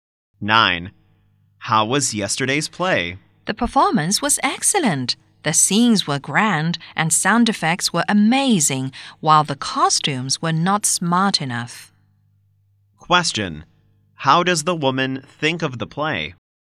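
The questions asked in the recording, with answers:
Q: Question. How does the woman think of the play?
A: Excellent overall, but the costumes were not smart enough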